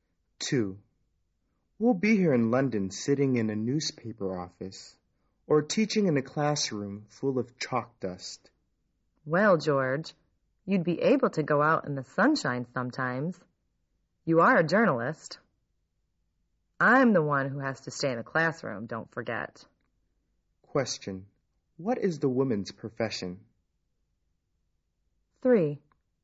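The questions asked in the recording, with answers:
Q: What is the woman's profession?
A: A teacher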